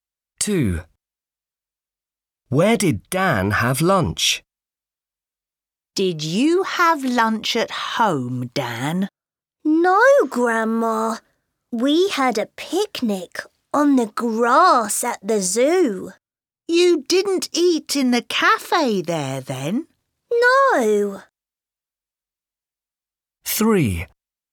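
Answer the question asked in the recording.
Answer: On the grass at the zoo (a picnic)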